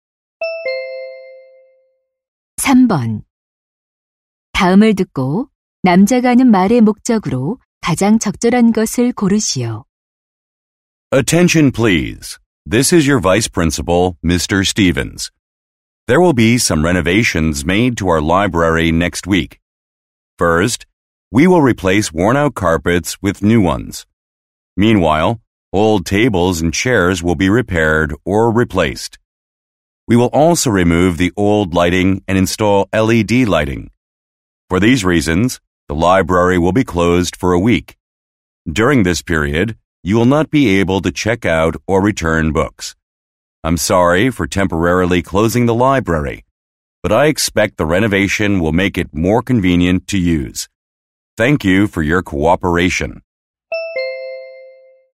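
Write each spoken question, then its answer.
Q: 다음을 듣고 남자가 하는 말의 목적으로 가장 적절한 것을 고르시오.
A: 도서관 보수 공사로 인한 일주일간 휴관을 알리려고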